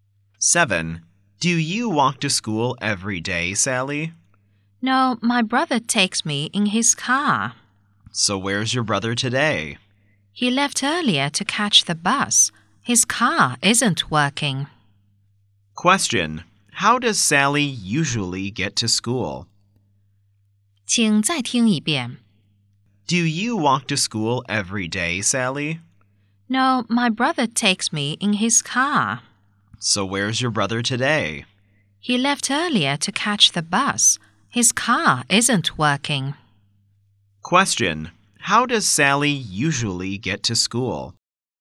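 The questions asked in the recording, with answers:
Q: How does Sally usually get to school?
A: Her brother drives her in his car.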